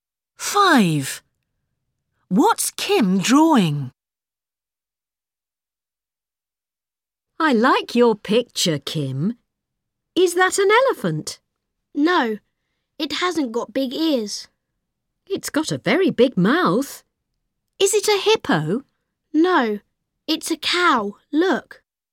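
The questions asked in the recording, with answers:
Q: What's Kim drawing?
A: a cow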